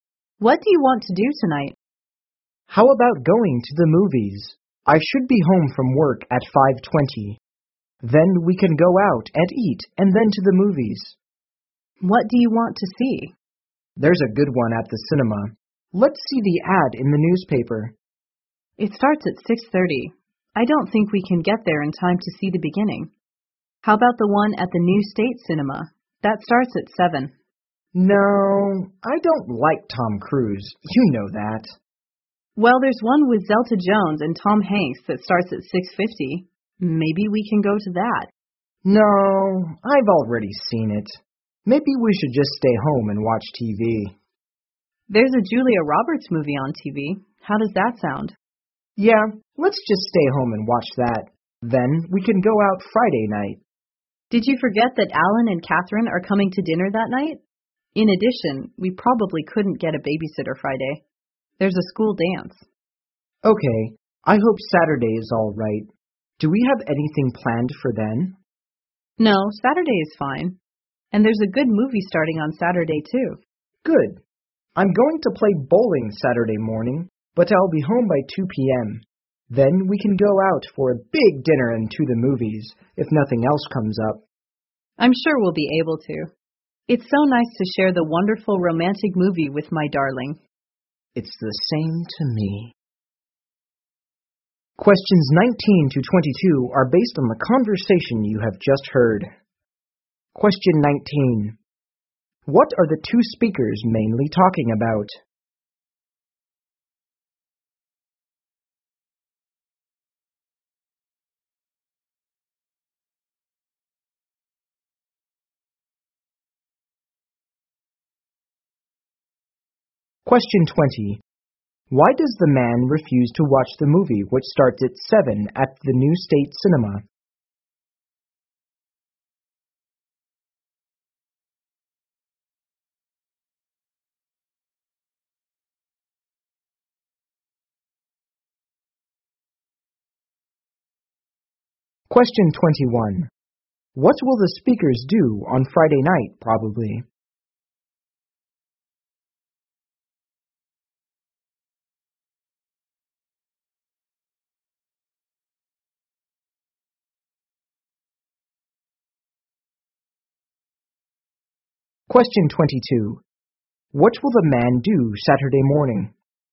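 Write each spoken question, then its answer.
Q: What are the two speakers mainly talking about?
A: Their plans to see a movie

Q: Why does the man refuse to watch the movie which starts at 7 at the New State Cinema?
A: He doesn't like Tom Cruise

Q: What will the speakers do on Friday night, probably?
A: Have dinner with Alan and Catherine

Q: What will the man do Saturday morning?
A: Go bowling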